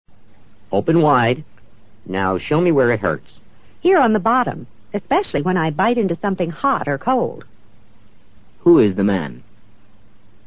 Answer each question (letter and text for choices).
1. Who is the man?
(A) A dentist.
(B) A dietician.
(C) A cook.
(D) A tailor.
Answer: (A) A dentist.

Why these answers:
依据对话提供的信息可以判断女方是在诊所看牙。只有A是可能的答案。dentist: 牙医。dietician:营养医生。 tailor: 裁缝。

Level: 世博高级听说